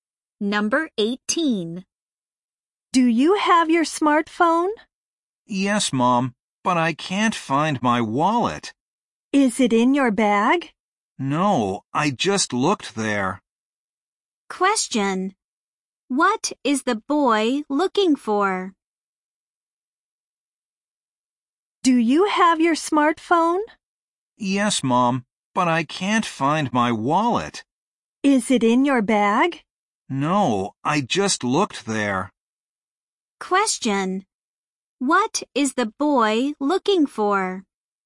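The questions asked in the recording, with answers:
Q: What is the boy looking for?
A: His wallet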